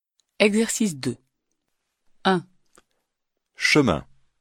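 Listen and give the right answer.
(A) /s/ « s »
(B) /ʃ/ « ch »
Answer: (B) /ʃ/ « ch »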